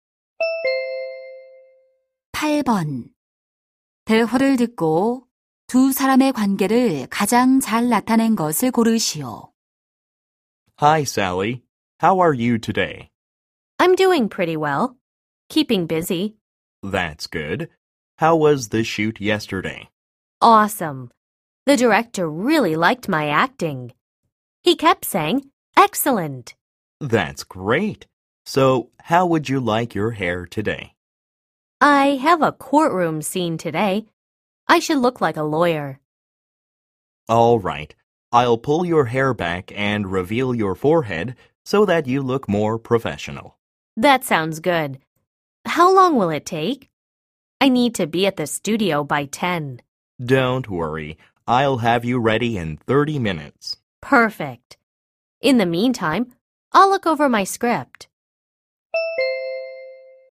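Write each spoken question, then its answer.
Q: 대화를 듣고 두 사람의 관계를 가장 잘 나타낸 것을 고르시오.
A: 배우 - 헤어 스타일리스트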